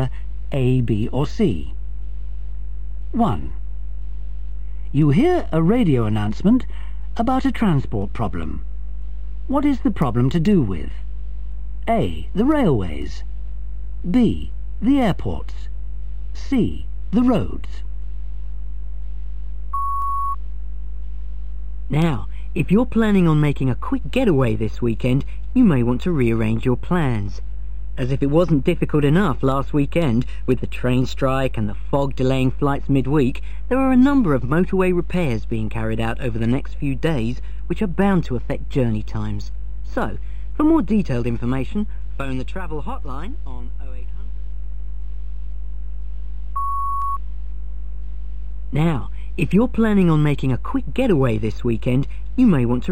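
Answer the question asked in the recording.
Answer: C: The roads.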